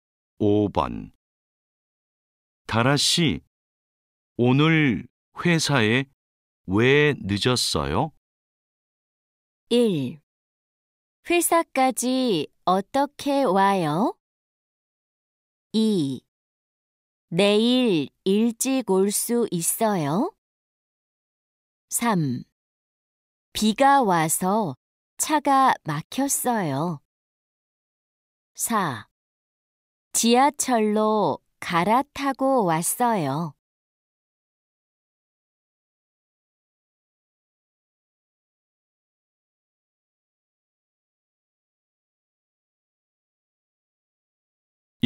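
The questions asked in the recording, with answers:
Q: 다라 씨, 오늘 회사에 왜 늦었어요?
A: 3: 비가 와서 차가 막혔어요.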